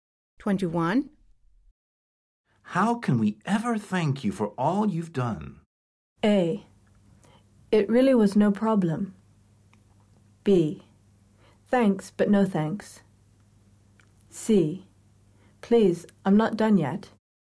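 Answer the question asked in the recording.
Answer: A: It really was no problem.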